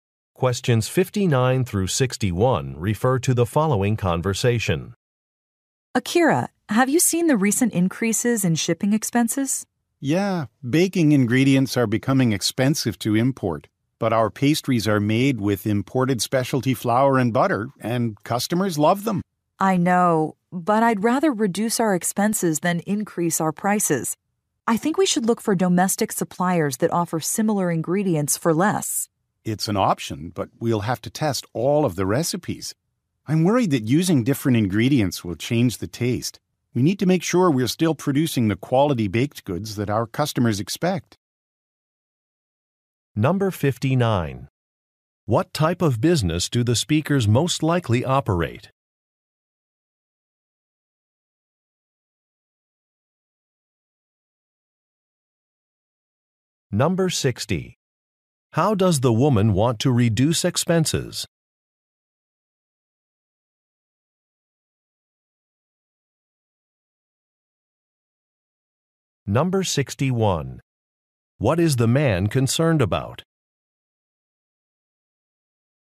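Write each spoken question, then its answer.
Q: What type of business do the speakers most likely operate?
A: A bakery

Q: How does the woman want to reduce expenses?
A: By finding domestic suppliers

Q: What is the man concerned about?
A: The taste of the products changing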